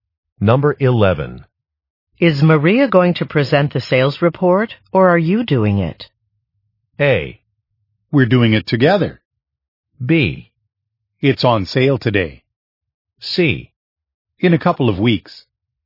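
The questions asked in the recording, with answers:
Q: Is Maria going to present the sales report, or are you doing it?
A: A: We're doing it together.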